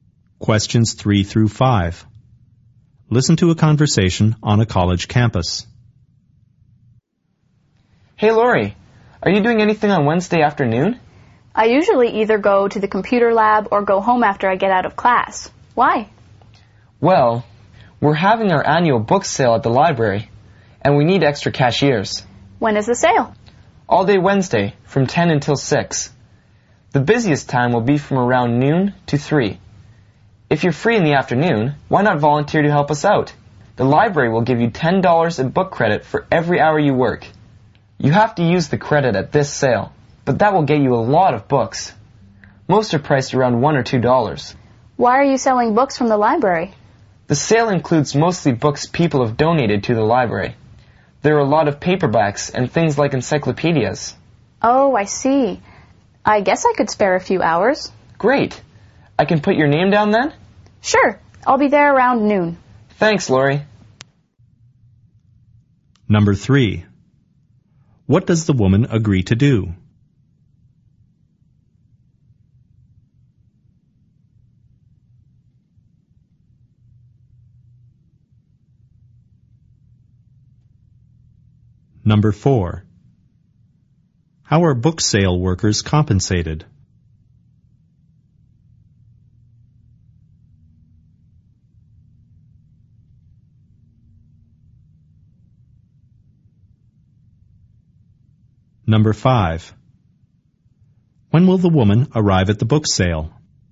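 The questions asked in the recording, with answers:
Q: What does the woman agree to do?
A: Volunteer as a cashier at the library book sale

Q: How are book sale workers compensated?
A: $10 in book credit per hour

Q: When will the woman arrive at the book sale?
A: Around noon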